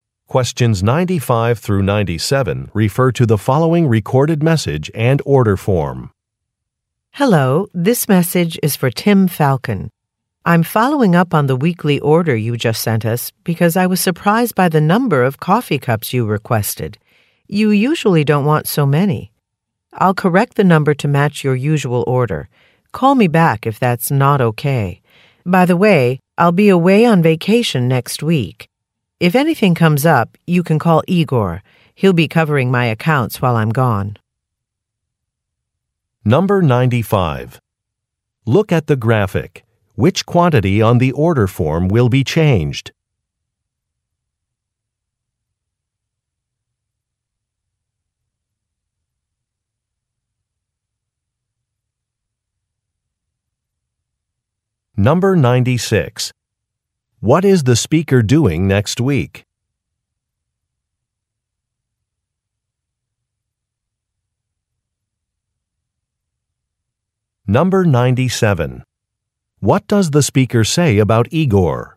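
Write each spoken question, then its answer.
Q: What is the speaker doing next week?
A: Going on vacation

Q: What does the speaker say about Igor?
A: He will cover the speaker's accounts while the speaker is away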